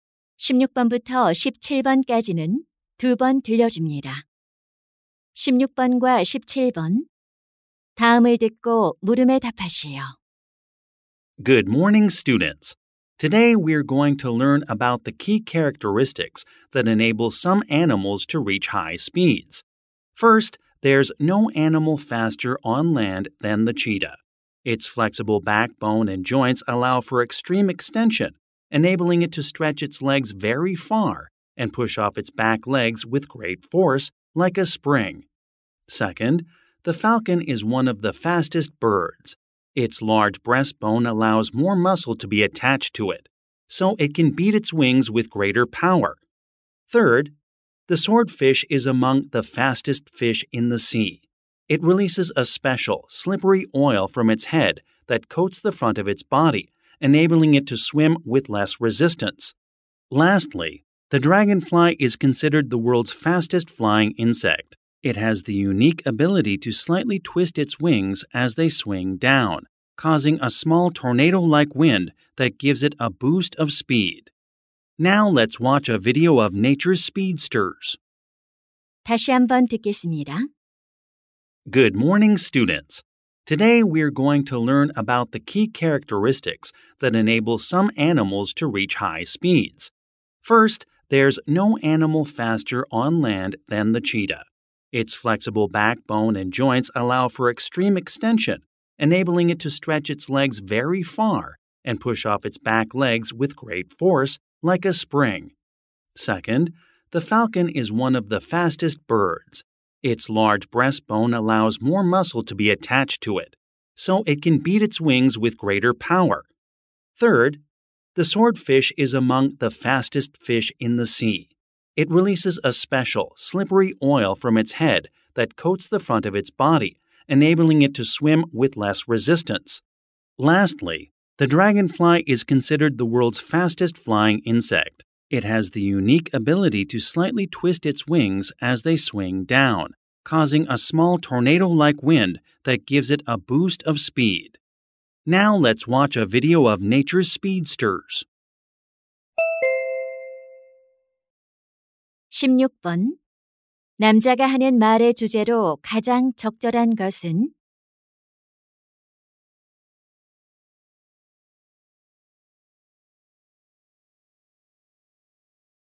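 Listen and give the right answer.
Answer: 일부 동물이 빠른 속도를 낼 수 있게 하는 주요 특징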